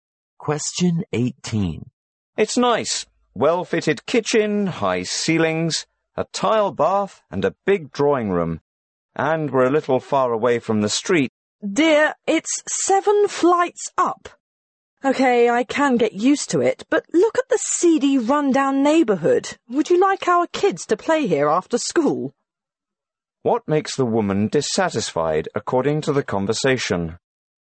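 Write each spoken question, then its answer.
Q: What makes the woman dissatisfied, according to the conversation?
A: The seedy, run-down neighbourhood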